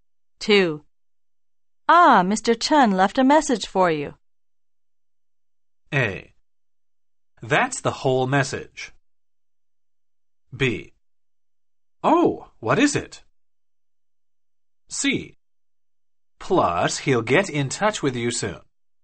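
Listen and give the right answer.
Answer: B: Oh, what is it?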